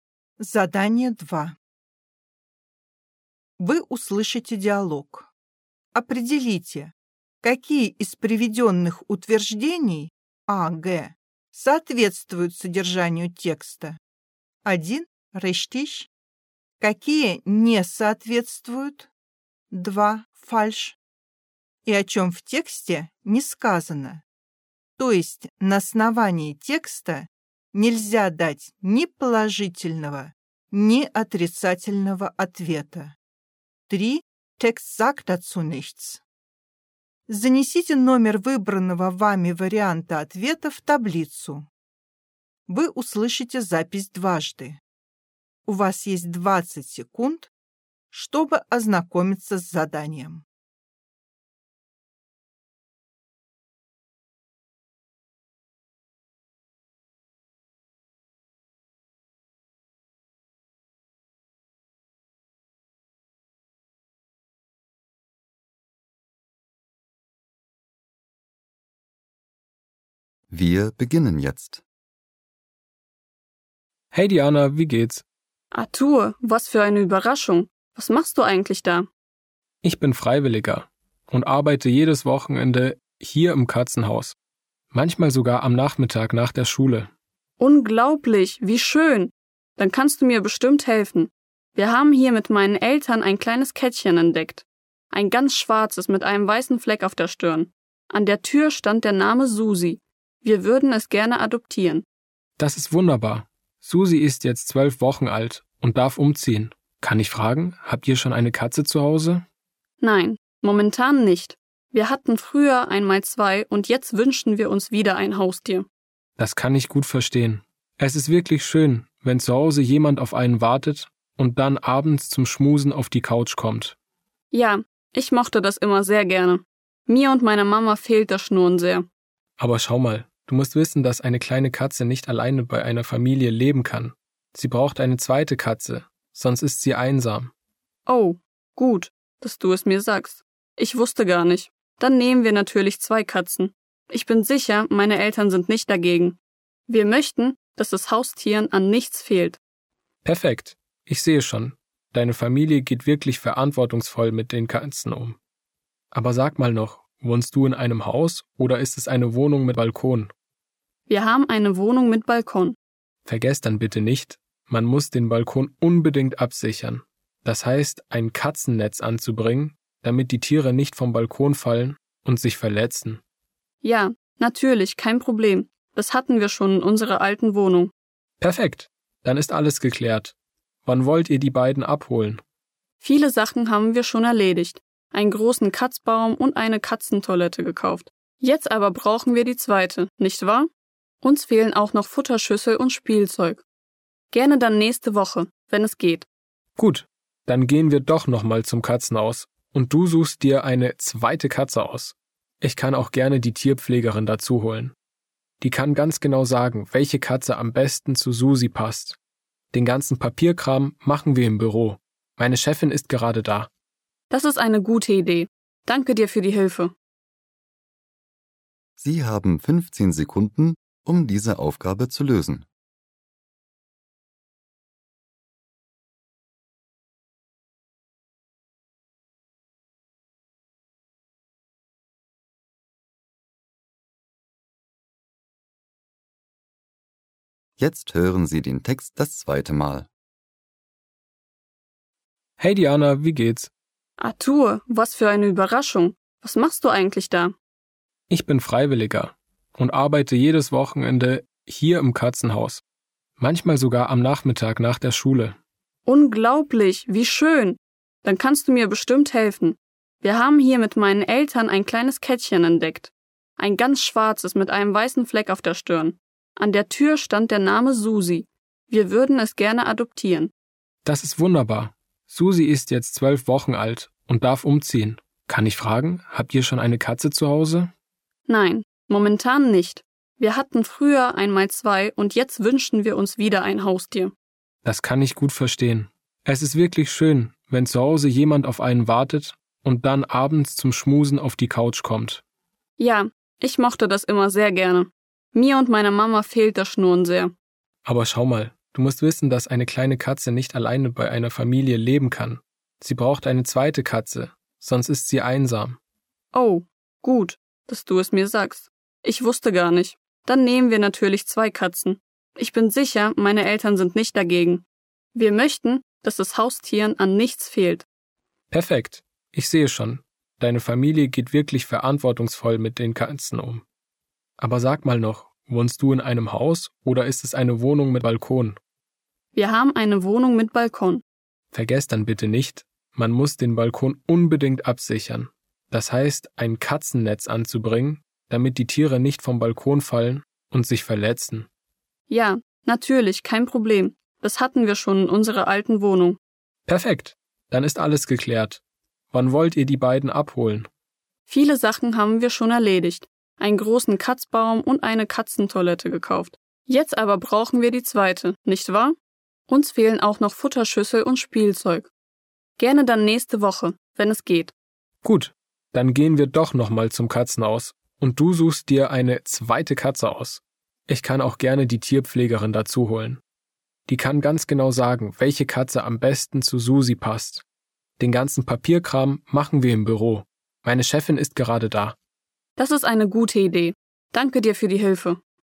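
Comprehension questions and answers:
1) Diana wusste im Voraus, dass sie Artur im Katzenhaus trifft.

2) Man darf Susi erst in drei Wochen adoptieren.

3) Als Dianas Eltern klein waren, hatten sie keine Haustiere.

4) Artur mag lieber Hunde als Katzen.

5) Ein Balkon ohne Katzennetz kann für Katzen gefährlich sein.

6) Diana und ihre Mutter müssen noch ein paar Dinge für die Katzen kaufen.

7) Diana möchte an einem anderen Tag die zweite Katze auswählen.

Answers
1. Falsch
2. Falsch
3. Text sagt dazu nichts
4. Text sagt dazu nichts
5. Richtig
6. Richtig
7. Falsch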